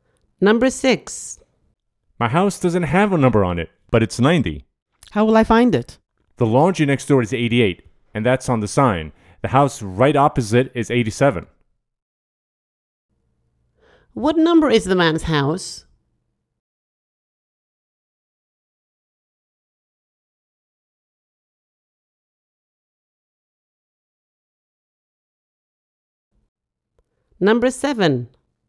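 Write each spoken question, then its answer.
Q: What number is the man's house?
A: 90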